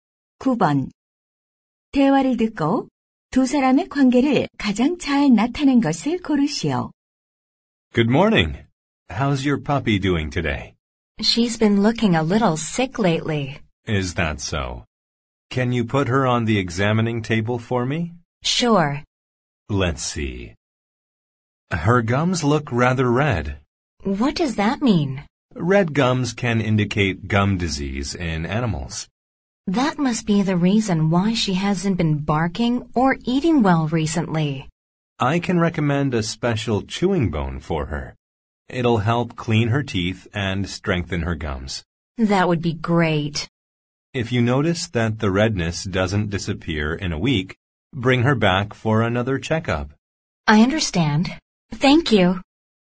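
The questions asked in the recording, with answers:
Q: 대화를 듣고 두 사람의 관계를 가장 잘 나타낸 것을 고르시오.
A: 수의사 - 반려견 주인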